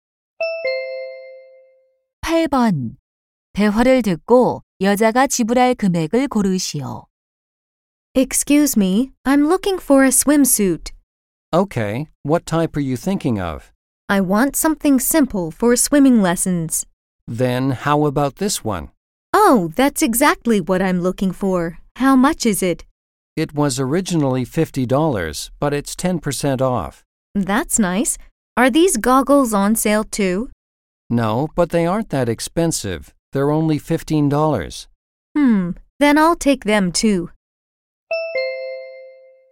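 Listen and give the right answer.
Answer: 60달러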